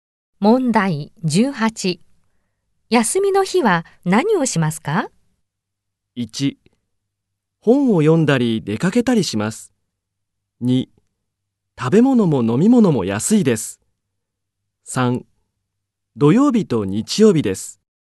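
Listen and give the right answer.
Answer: 1: 本を読んだり出かけたりします。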